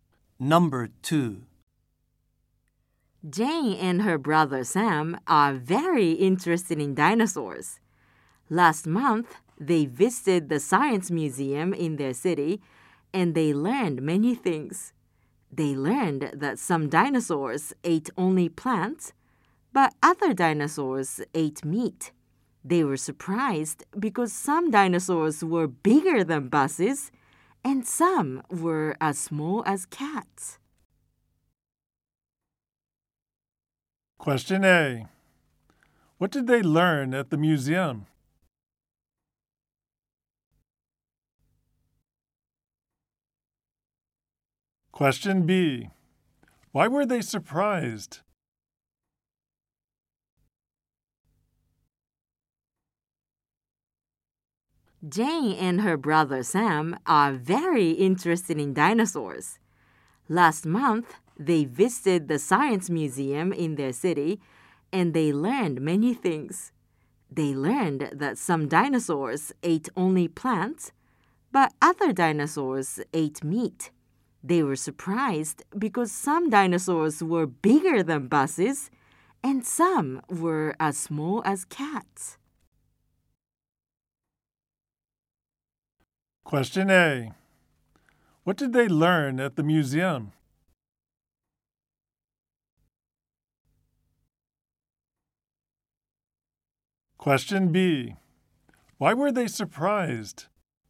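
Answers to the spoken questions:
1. Some dinosaurs ate only plants, but other dinosaurs ate meat.
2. Some dinosaurs were bigger than buses, and some were as small as cats.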